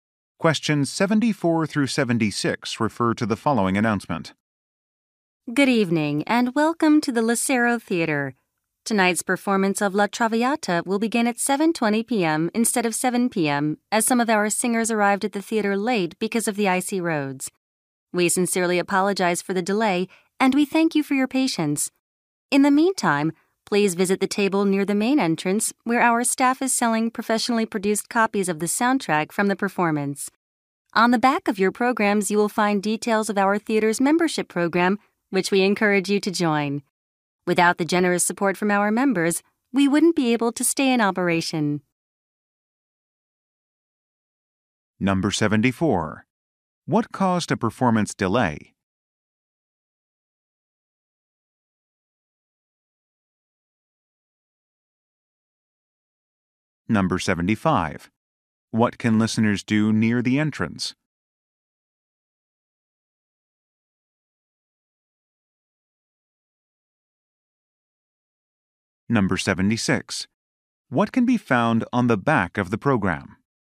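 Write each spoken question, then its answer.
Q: What caused a performance delay?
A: Singers arrived late because of icy roads

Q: What can listeners do near the entrance?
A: Buy copies of the soundtrack

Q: What can be found on the back of the program?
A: Details of the theater's membership program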